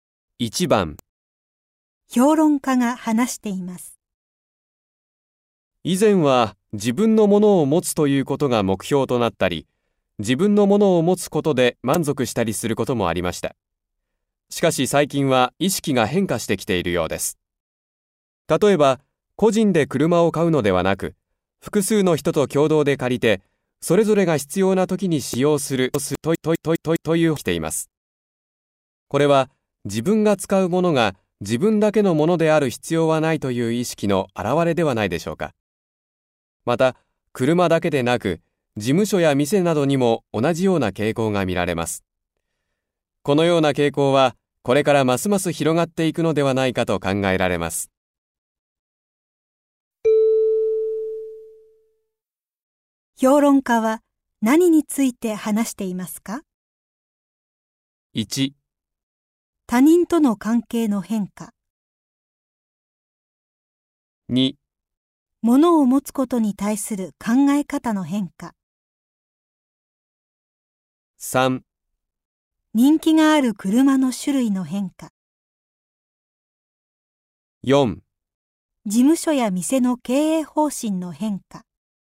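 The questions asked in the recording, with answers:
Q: 評論家は何について話していますか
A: 2: 物を持つことに対する考え方の変化。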